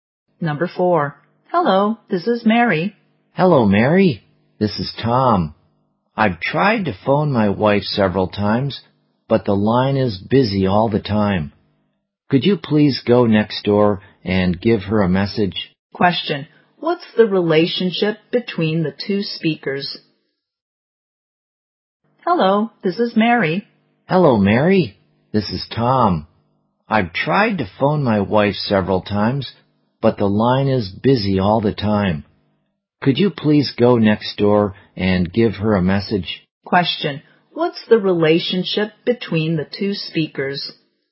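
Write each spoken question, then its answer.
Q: Question, what's the relationship between the two speakers?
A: Neighbors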